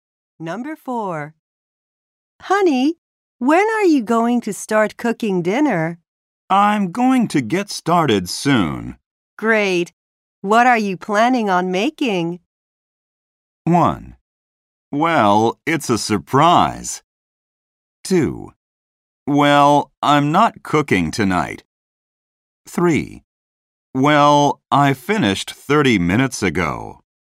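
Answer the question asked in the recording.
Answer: 1: Well, it's a surprise.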